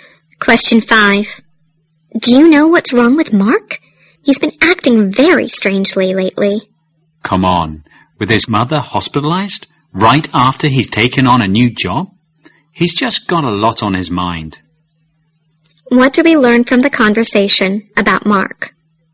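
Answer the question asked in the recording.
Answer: He is under a lot of stress: his mother is in hospital and he has just started a new job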